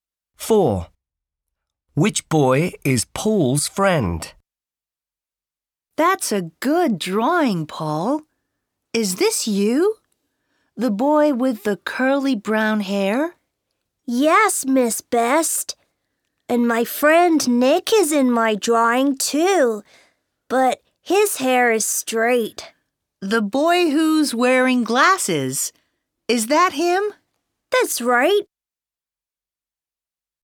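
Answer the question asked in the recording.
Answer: The boy with straight hair who's wearing glasses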